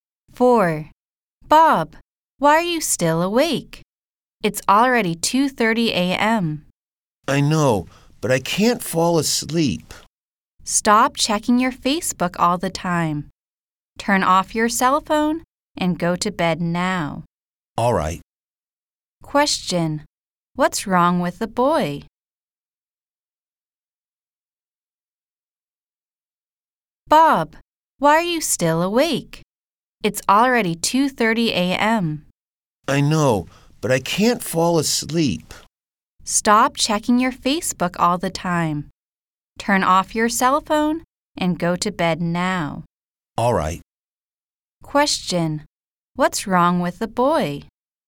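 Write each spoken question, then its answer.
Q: What's wrong with the boy?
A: He can't fall asleep.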